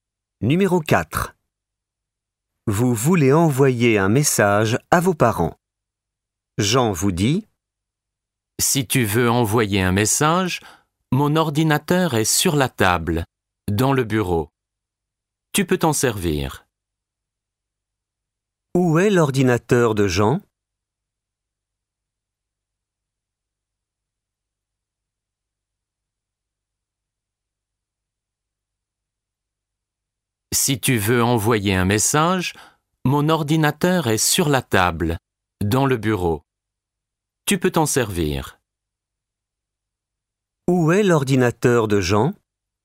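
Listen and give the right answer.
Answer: Sur la table, dans le bureau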